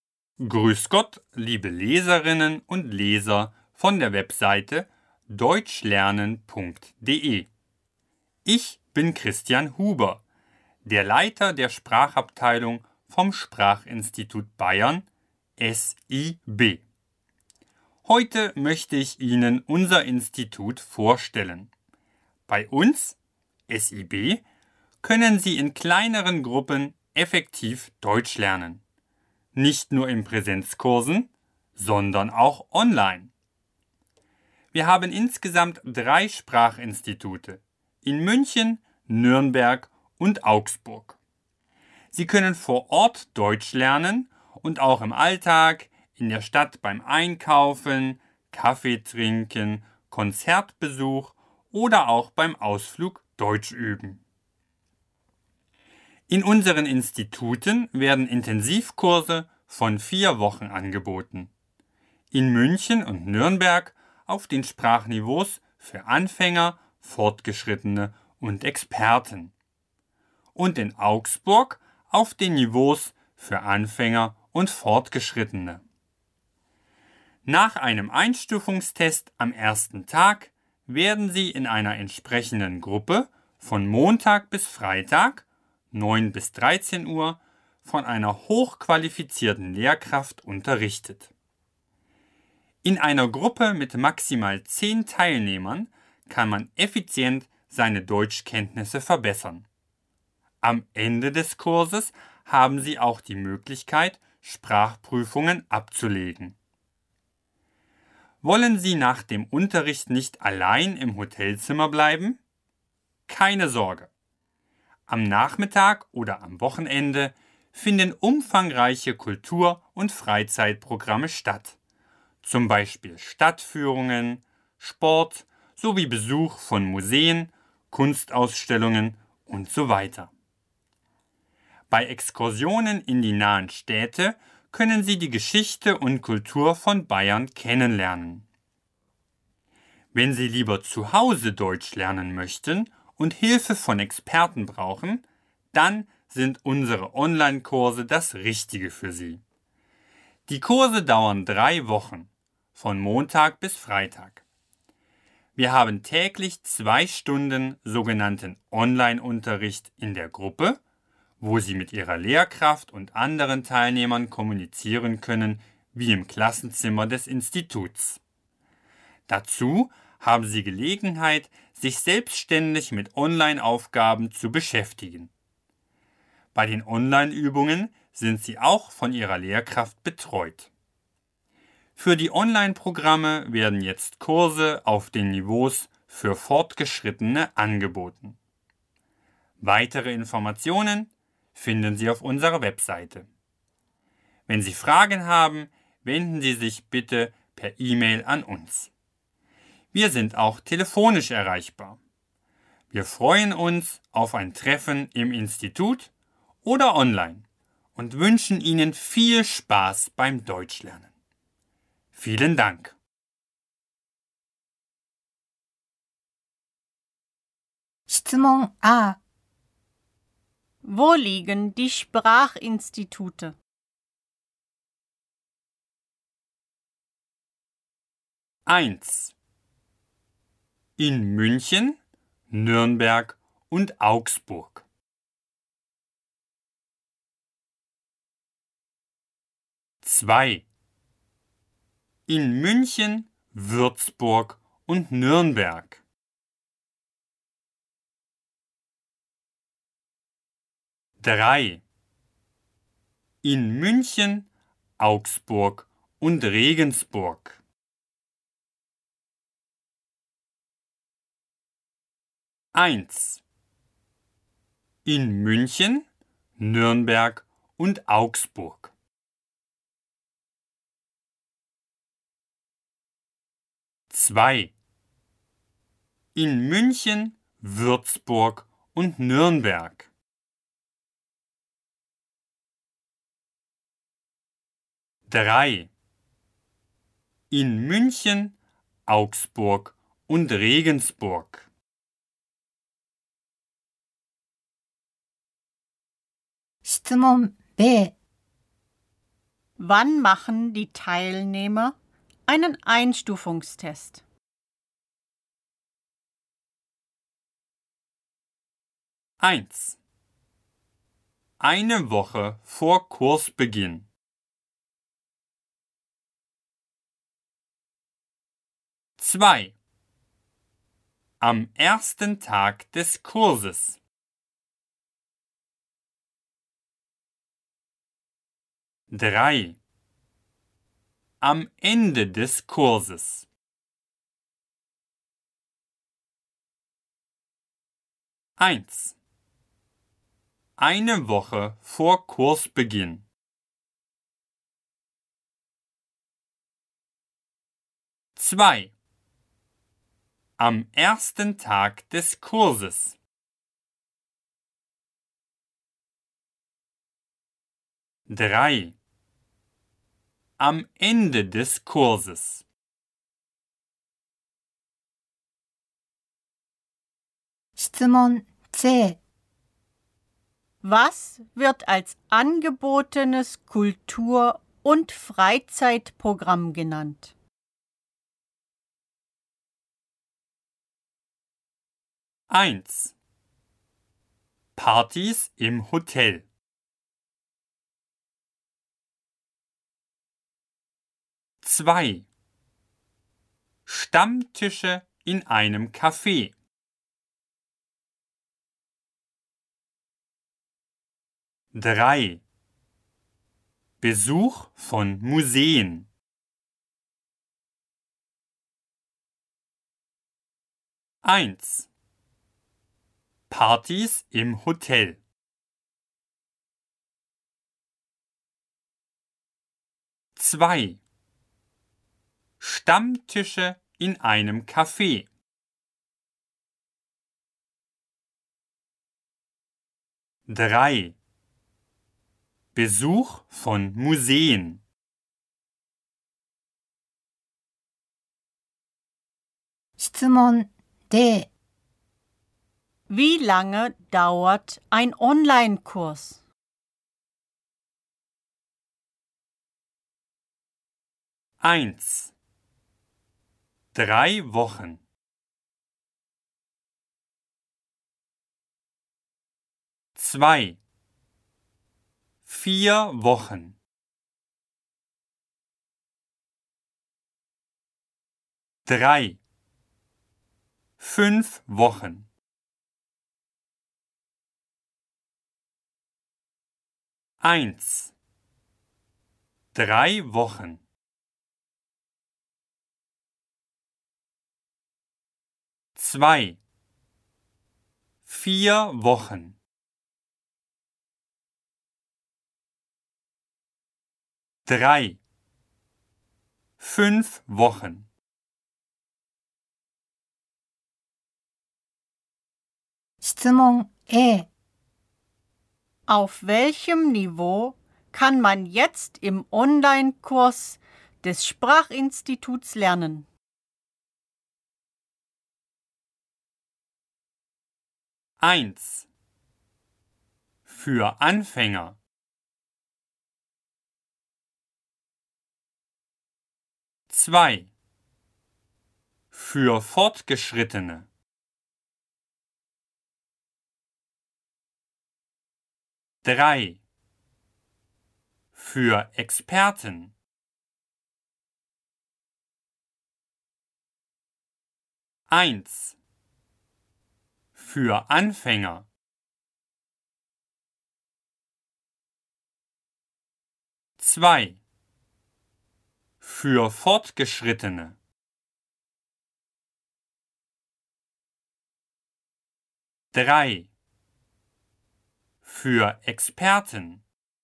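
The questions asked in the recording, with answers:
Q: Wo liegen die Sprachinstitute?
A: 1: In München, Nürnberg und Augsburg.

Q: Wann machen die Teilnehmer einen Einstufungstest?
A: 2: Am ersten Tag des Kurses.

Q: Was wird als angebotenes Kultur- und Freizeitprogramm genannt?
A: 3: Besuch von Museen.

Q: Wie lange dauert ein Online-Kurs?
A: 1: Drei Wochen.

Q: Auf welchem Niveau kann man jetzt im Online-Kurs des Sprachinstituts lernen?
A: 2: Für Fortgeschrittene.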